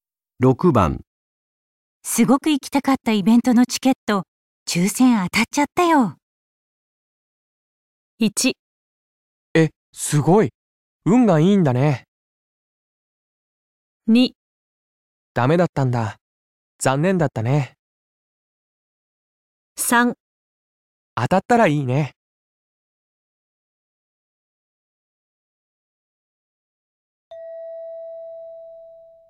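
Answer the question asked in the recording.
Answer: 1: すごい。運がいいんだね。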